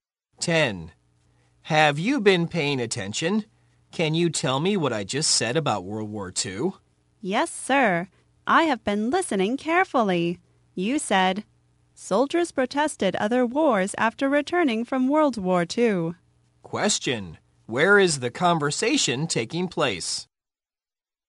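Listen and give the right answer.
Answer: In a classroom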